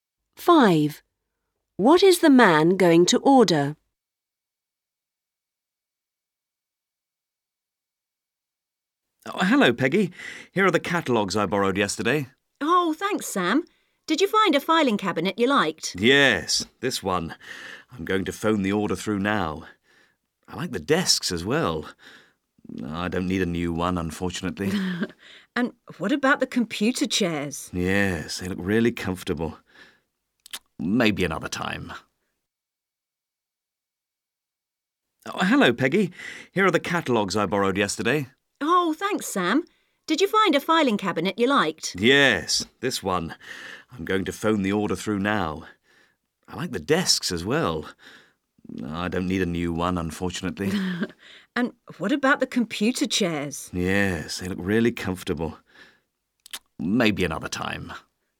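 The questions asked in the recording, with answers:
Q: What is the man going to order?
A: A filing cabinet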